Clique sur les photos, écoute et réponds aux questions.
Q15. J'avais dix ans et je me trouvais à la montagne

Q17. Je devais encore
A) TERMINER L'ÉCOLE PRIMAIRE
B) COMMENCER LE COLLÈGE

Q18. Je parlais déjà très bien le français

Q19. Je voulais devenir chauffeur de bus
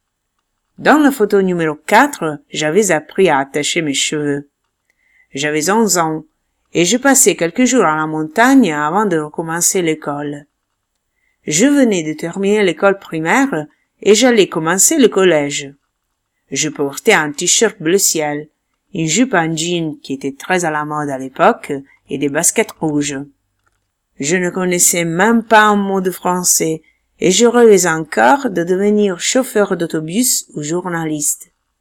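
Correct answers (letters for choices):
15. PARTIELLEMENT VRAI
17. B
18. FAUX
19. VRAI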